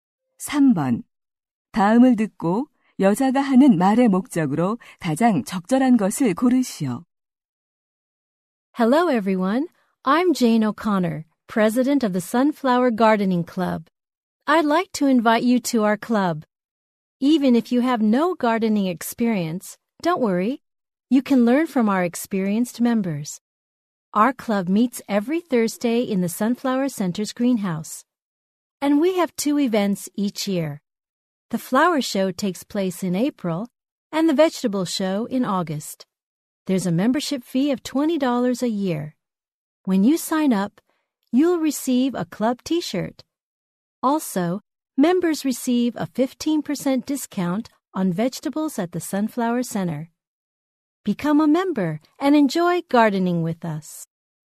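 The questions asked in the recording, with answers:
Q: 다음을 듣고 여자가 하는 말의 목적으로 가장 적절한 것을 고르시오.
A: 정원 가꾸기 동호회 가입을 권유하려고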